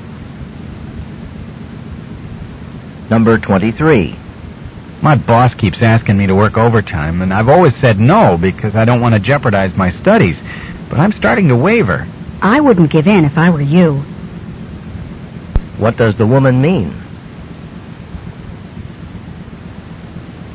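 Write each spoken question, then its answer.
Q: What does the woman mean?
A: He shouldn't agree to work overtime.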